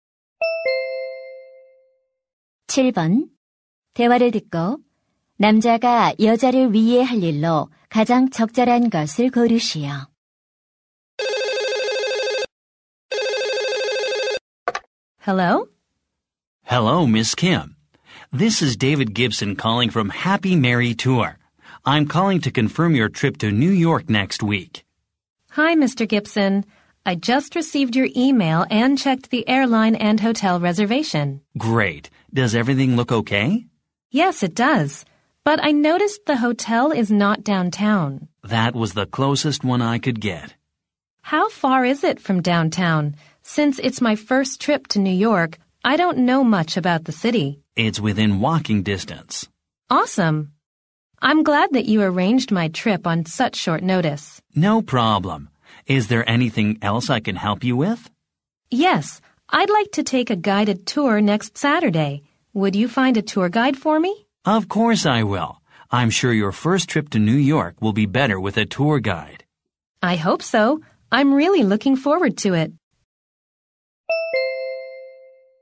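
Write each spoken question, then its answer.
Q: 대화를 듣고 남자가 여자를 위해 할 일로 가장 적절한 것을 고르시오.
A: 여행 가이드 찾아 주기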